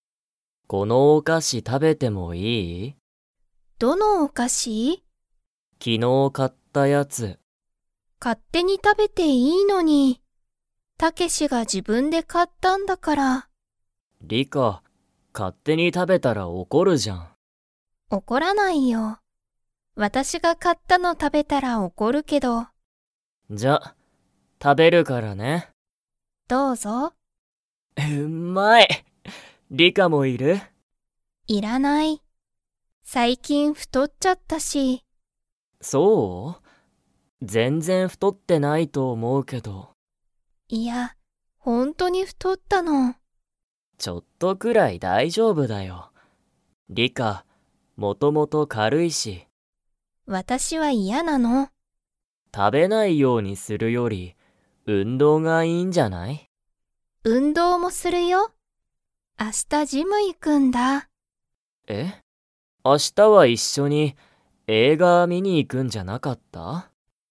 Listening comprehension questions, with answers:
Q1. お菓子(かし)は誰(だれ)が買(か)いましたか?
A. タケシ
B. リカ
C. タケシの母(はは)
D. リカの父(ちち)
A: タケシ

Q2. リカは明日(あした)ジムに 。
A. 行(い)く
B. 行(い)かない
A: 行(い)く

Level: Level 4

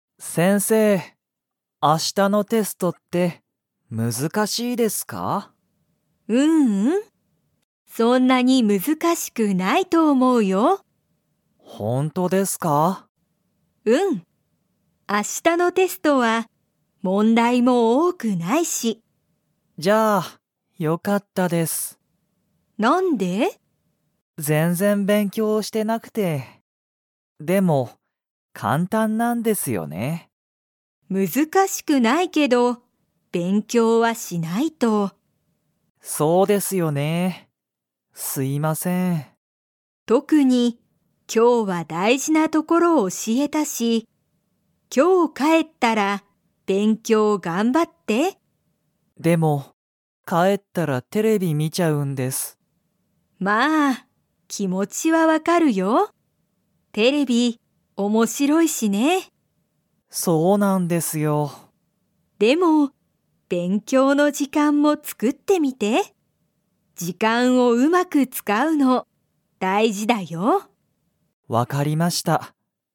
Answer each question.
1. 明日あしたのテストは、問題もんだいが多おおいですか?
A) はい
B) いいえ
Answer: いいえ

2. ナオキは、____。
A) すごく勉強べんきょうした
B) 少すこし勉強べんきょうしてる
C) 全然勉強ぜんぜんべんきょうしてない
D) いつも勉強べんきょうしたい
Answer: 全然勉強ぜんぜんべんきょうしてない

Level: Level 2

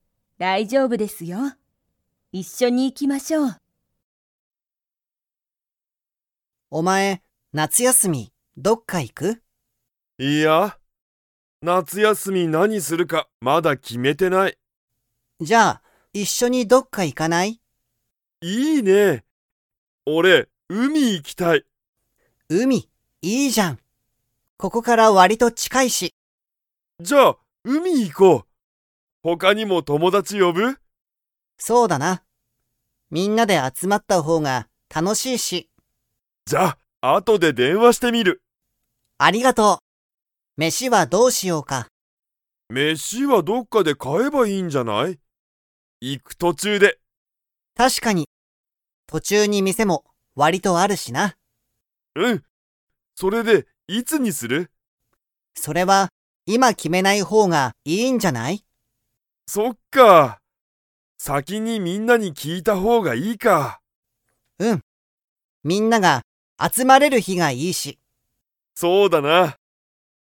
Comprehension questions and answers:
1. 二人ふたりは、夏休なつやすみにどこに行いきますか?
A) 海うみ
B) 山やま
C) 大学だいがく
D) 会社かいしゃ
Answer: 海うみ

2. 二人ふたりは、いつにするか今いま 。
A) 決きめる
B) 決きめない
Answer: 決きめない

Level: Level 3

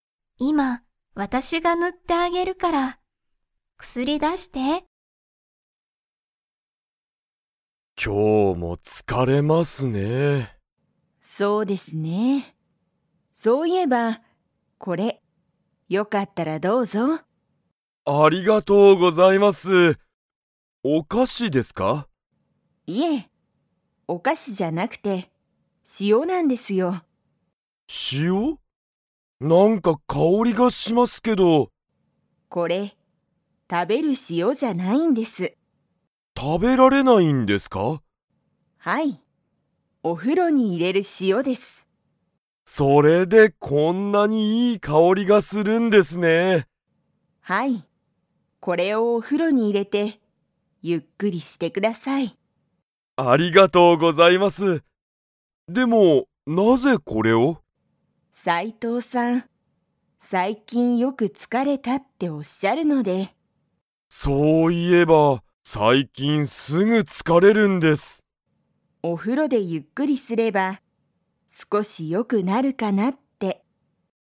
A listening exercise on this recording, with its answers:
Comprehension Quiz (Skip if you don't understand the conversation yet)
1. 松井まついさんは斉藤さいとうさんに、何なにをあげましたか?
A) お菓子かし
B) 塩しお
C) お風呂ふろ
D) 薬くすり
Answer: 塩しお

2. 斉藤さいとうさんは最近さいきん 。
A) すぐ疲つかれる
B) 全まったく疲つかれない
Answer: すぐ疲つかれる

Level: Level 4

